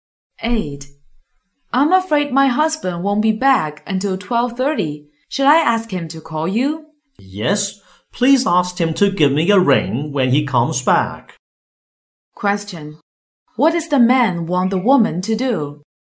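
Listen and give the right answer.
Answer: Ask her husband to call him back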